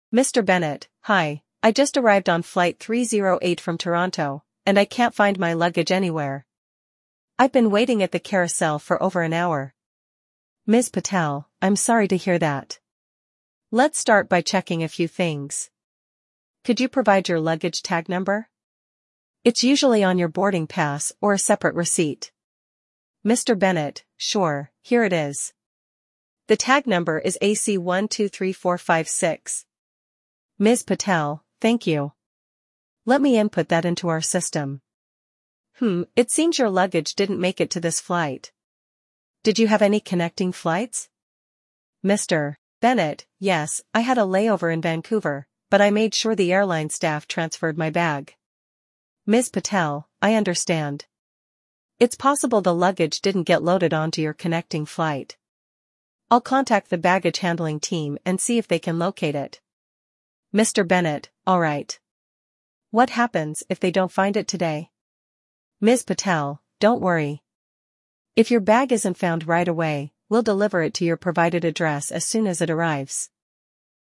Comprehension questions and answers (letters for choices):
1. What is the primary reason for Mr. Bennett's visit to the airport counter?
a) To book a connecting flight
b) To report his missing luggage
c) To confirm his boarding pass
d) To request a new luggage tag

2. What information does Ms. Patel ask for to start the process?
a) Mr. Bennett's flight ticket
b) Luggage tag number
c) Layover details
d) Contact address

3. What will happen if the luggage is not found immediately?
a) Mr. Bennett will have to return to the airport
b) The luggage will be delivered to his address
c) A replacement bag will be issued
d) The luggage will be stored at the airport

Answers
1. b
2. b
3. b

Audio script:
Mr. Bennett: Hi, I just arrived on Flight 308 from Toronto, and I can't find my luggage anywhere. I've been waiting at the carousel for over an hour.
Ms. Patel: I'm sorry to hear that. Let's start by checking a few things. Could you provide your luggage tag number? It's usually on your boarding pass or a separate receipt.
Mr. Bennett: Sure, here it is. The tag number is AC123456.
Ms. Patel: Thank you. Let me input that into our system. Hmm, it seems your luggage didn't make it to this flight. Did you have any connecting flights?
Mr. Bennett: Yes, I had a layover in Vancouver, but I made sure the airline staff transferred my bag.
Ms. Patel: I understand. It's possible the luggage didn't get loaded onto your connecting flight. I'll contact the baggage handling team and see if they can locate it.
Mr. Bennett: Alright. What happens if they don't find it today?
Ms. Patel: Don't worry. If your bag isn't found right away, we'll deliver it to your provided address as soon as it arrives.